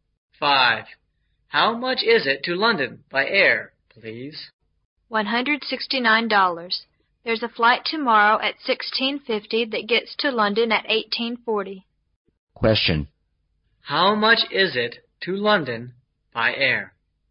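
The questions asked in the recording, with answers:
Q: How much is it to London by air?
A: $169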